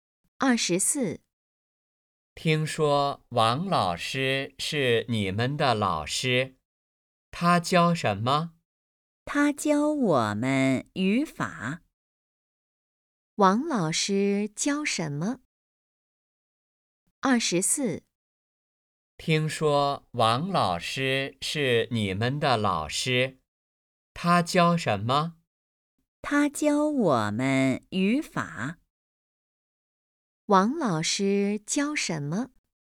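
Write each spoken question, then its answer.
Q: 王老师教什么?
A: 语法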